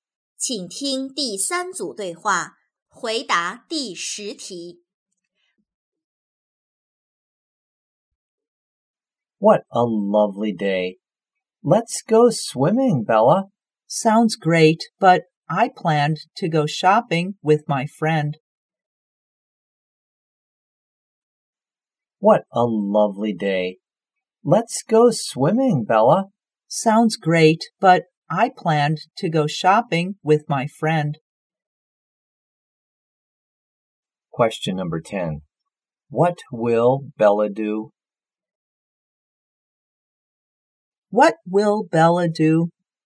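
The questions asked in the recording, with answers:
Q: What will Bella do?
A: Go shopping with her friend.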